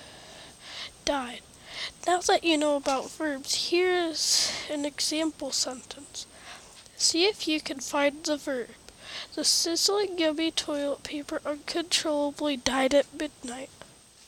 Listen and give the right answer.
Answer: Correct, it was died.